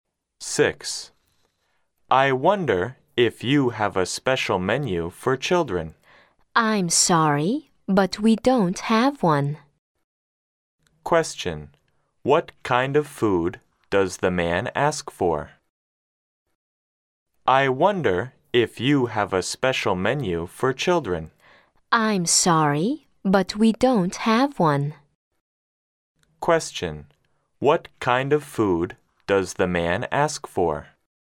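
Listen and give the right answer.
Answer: Food for children (a special children's menu)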